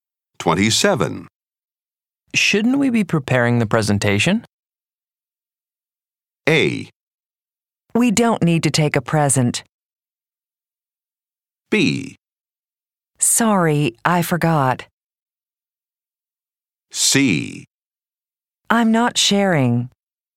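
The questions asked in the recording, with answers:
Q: Shouldn't we be preparing the presentation?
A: B: Sorry, I forgot.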